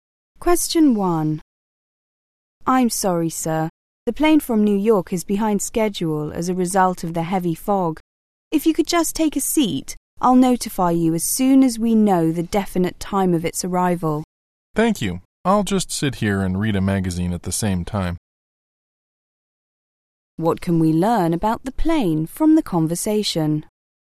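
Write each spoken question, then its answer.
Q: What can we learn about the plane from the conversation?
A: It is delayed because of heavy fog.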